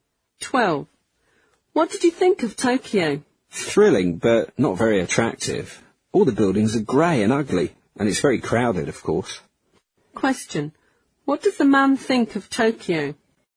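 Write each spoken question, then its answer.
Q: What does the man think of Tokyo?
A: Thrilling but not very attractive: grey, ugly buildings and very crowded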